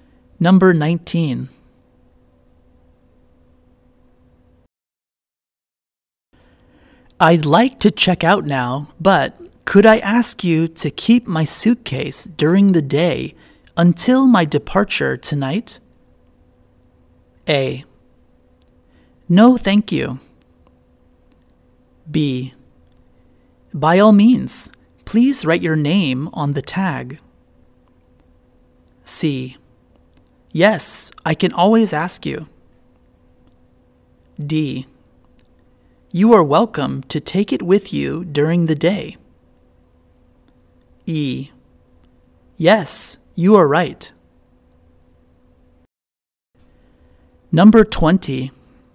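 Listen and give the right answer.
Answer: B: By all means, please write your name on the tag.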